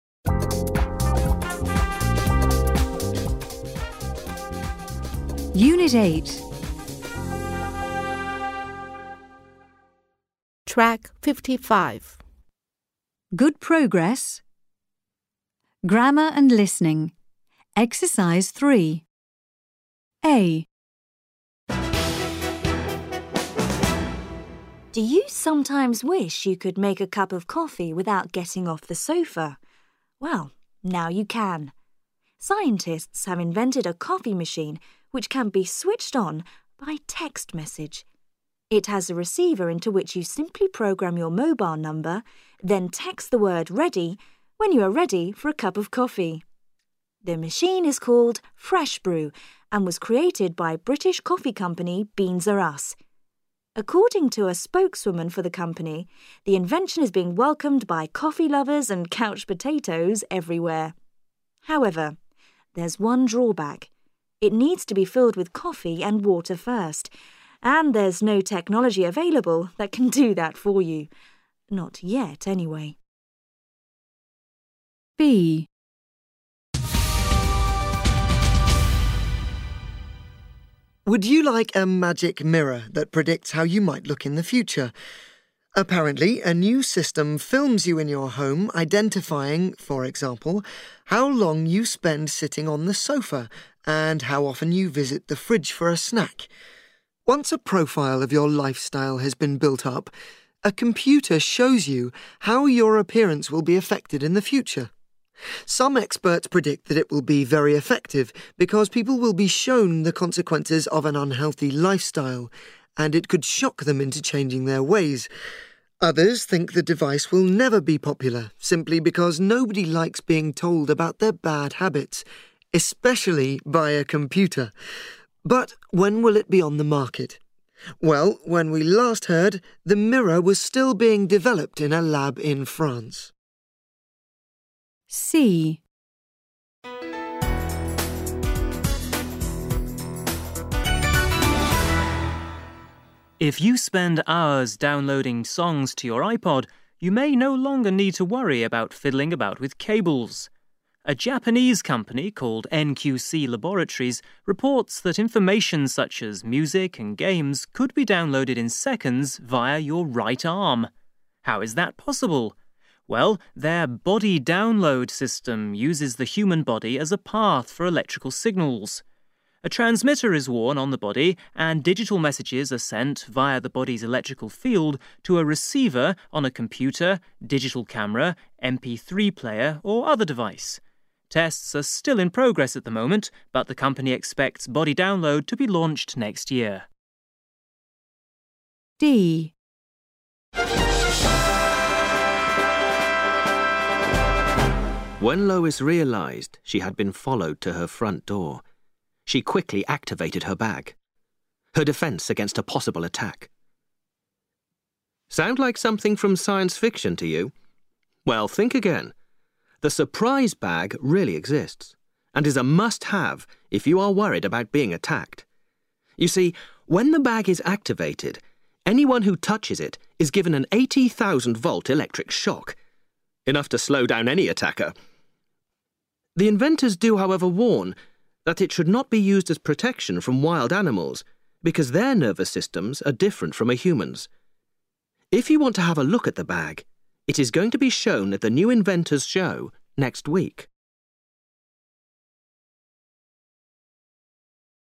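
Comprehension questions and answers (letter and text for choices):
Listen and match inventions A--D to sentences 1-10.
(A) The Surprise Bag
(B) Magic Mirror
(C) The coffee machine Fresh Brew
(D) Body Download system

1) It is going to be shown at the 'New Inventors' show next month.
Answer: (A) The Surprise Bag

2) It can be switched on by text message.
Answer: (C) The coffee machine Fresh Brew

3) A transmitter is worn on the body and digital messages are sent via the body's electrical field.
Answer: (D) Body Download system

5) 'Fresh Brew' was created by British coffee company 'Beans R Us'.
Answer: (C) The coffee machine Fresh Brew

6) When Lois realized she had been followed to her front door, she quickly activated her bag.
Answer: (A) The Surprise Bag

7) Music and games could be downloaded in seconds via your right arm.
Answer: (D) Body Download system

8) When we last heard, the 'mirror' was still being developed in a lab in France.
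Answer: (B) Magic Mirror

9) According to a spokeswoman, the invention is being welcomed by coffee-lovers and couch potatoes everywhere.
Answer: (C) The coffee machine Fresh Brew

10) It should not be used as protection from wild animals.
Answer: (A) The Surprise Bag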